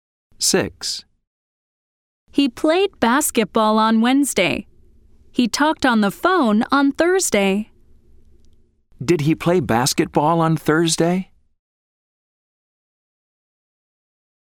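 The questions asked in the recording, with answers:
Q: Did he play basketball on Thursday?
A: No, he didn't. He talked on the phone.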